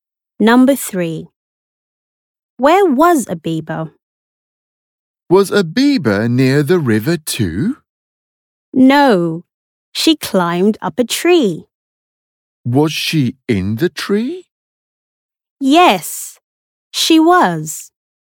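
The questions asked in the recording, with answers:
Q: Where was a beaver?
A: In a tree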